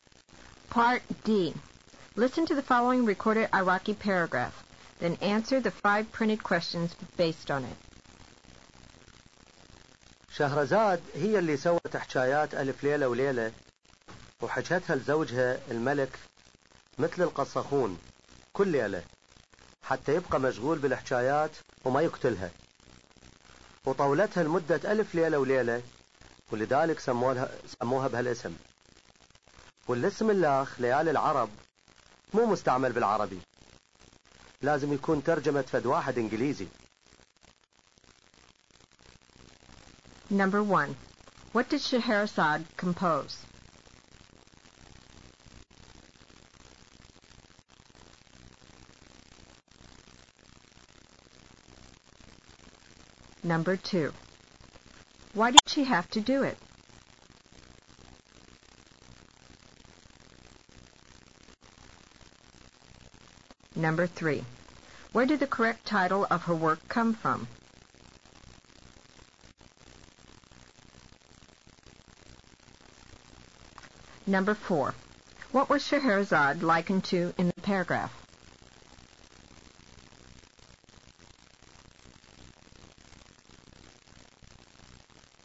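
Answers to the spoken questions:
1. The tales of the Thousand and One Nights
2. To keep her husband the king busy with the tales so he would not kill her
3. She stretched the tales over a thousand and one nights
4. A storyteller (qasakhoun)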